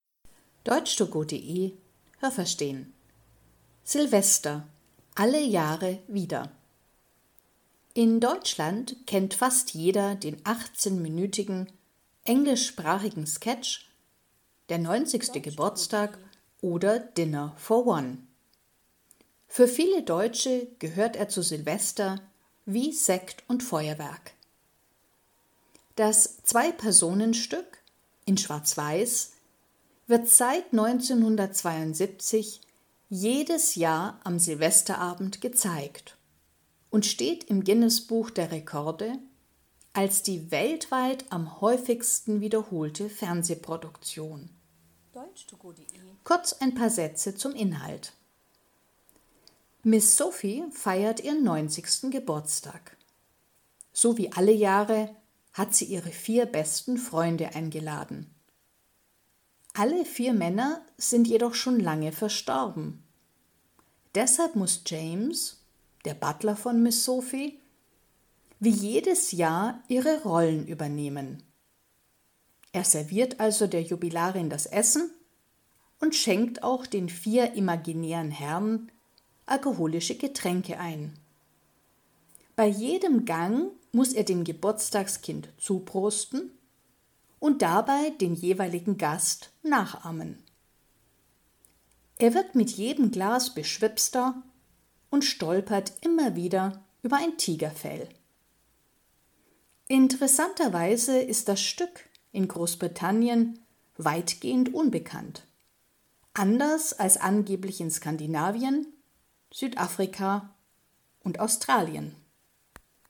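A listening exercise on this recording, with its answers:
Was haben Sie gehört? Es gibt nur eine korrekte Antwort.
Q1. Der Sketch „Der 90. Geburtstag oder Dinner for one" dauert ...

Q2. Der Sketch wird in Deutschland _____ gezeigt.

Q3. In dem Stück spielen _____ Schauspieler.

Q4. Das Stück ist die weltweit am häufigsten wiederholte Produktion _____ .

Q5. Miss Sophie feiert ihren Geburtstag und hat _____ eingeladen.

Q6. Ihre vier Freunde ...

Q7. Der Butler von Miss Sophie ...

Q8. Beim Essen muss er Miss Sophie bei jedem Gang _____ zuprosten.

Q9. Weil der Butler zu viel getrunken hat, ...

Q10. Der Sketch ist in _____ größtenteils unbekannt.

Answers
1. 18 Minuten
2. seit 1972 jedes Jahr am Silvesterabend
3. zwei
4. im Fernsehen
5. ihre vier besten Freunde
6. sind schon lange verstorben
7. heißt James und übernimmt die Rollen der vier Freunde
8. als der jeweilige Gast (den Gast nachahmend)
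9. stolpert er immer wieder über ein Tigerfell
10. Großbritannien

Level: Hörtexte B (mittel)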